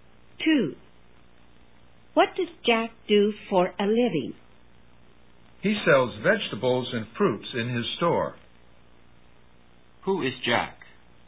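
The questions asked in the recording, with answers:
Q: Who is Jack?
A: A shopkeeper who sells fruit and vegetables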